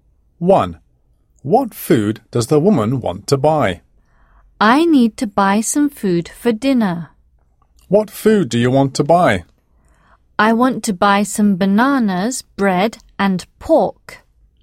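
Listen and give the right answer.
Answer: bananas, bread and pork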